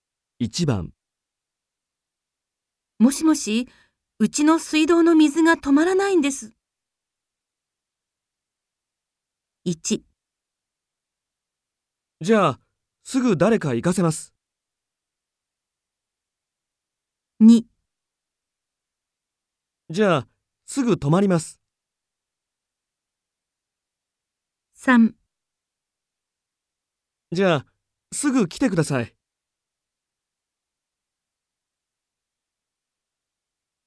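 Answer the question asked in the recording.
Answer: 1: じゃあ、すぐ誰か行かせます。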